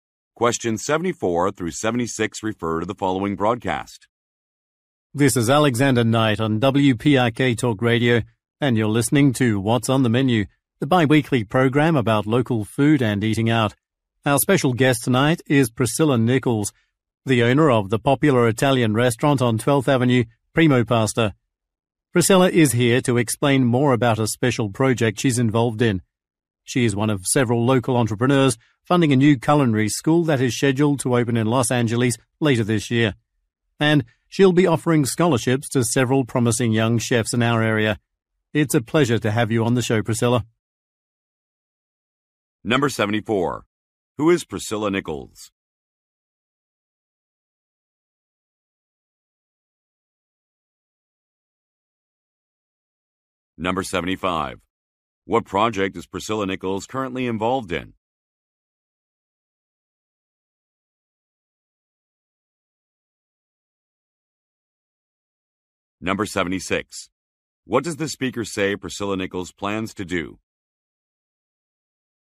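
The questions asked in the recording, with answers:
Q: Who is Priscilla Nichols?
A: A restaurant owner

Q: What project is Priscilla Nichols currently involved in?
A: Funding a new culinary school

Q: What does the speaker say Priscilla Nichols plans to do?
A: Offer scholarships to young chefs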